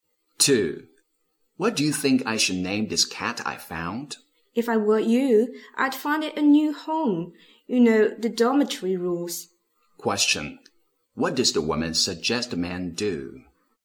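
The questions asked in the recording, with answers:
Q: What does the woman suggest the man do?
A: Find the cat a new home.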